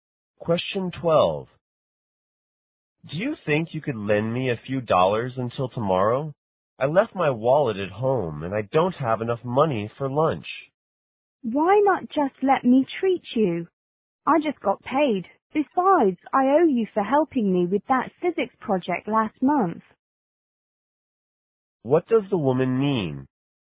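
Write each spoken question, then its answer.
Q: What does the woman mean?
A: She'll pay for the man's lunch.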